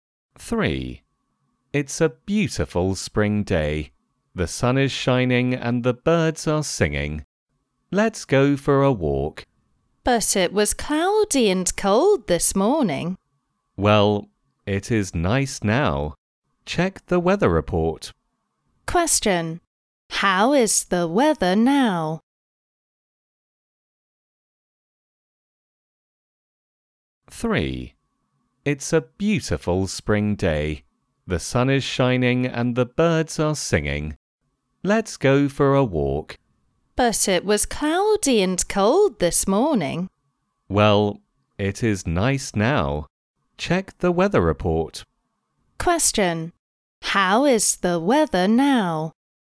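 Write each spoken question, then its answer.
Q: How is the weather now?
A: Sunny and nice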